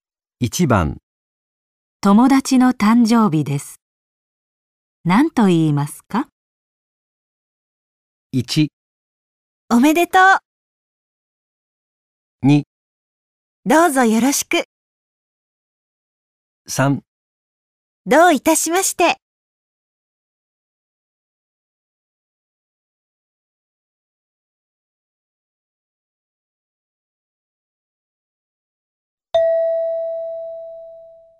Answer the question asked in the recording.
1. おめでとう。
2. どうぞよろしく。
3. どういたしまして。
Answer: 1. おめでとう。

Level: N5 Listening · Test 3